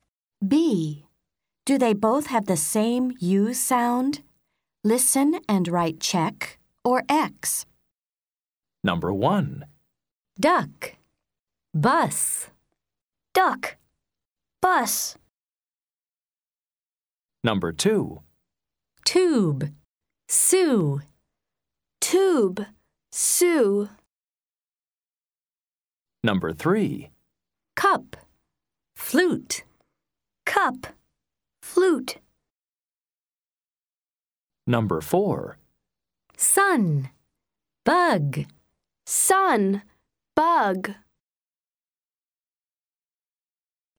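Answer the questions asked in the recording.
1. Yes (check)
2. Yes (check)
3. No (X)
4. Yes (check)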